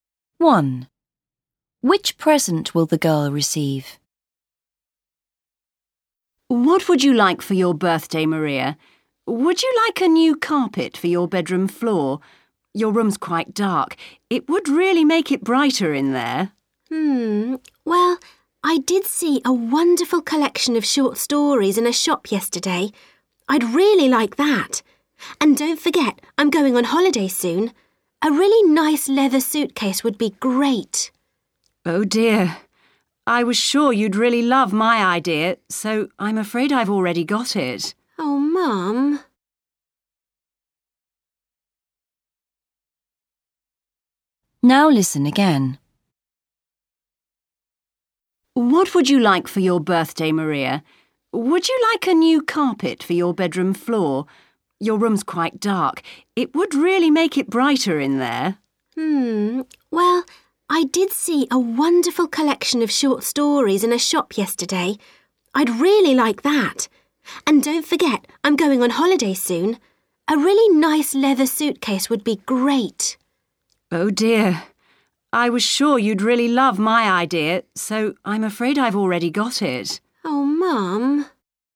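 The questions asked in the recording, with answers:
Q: Which present will the girl receive?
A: A carpet for her bedroom floor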